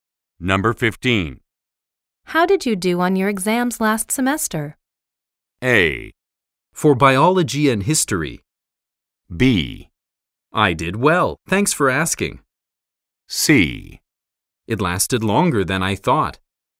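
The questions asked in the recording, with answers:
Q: How did you do on your exams last semester?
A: B: I did well, thanks for asking.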